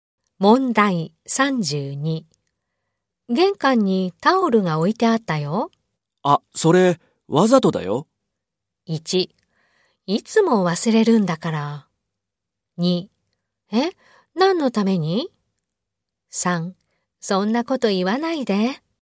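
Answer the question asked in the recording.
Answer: 2: え、何のために?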